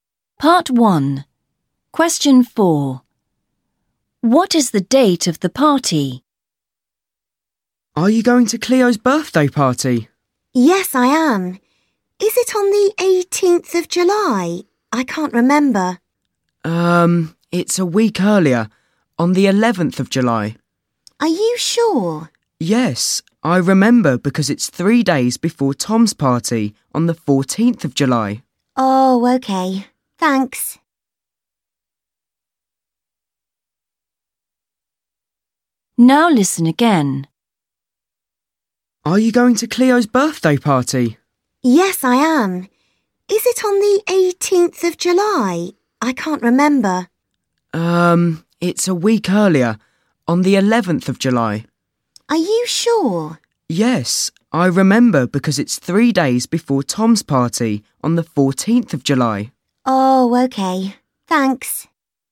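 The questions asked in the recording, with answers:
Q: What is the date of the party?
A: 11th of July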